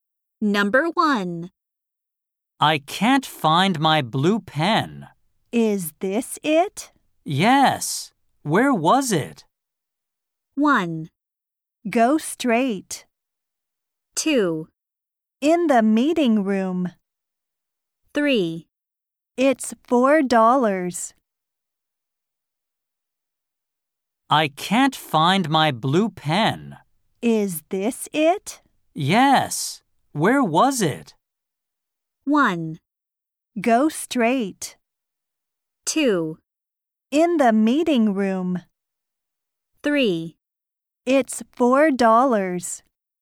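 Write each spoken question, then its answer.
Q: Yes. Where was it?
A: 2: In the meeting room.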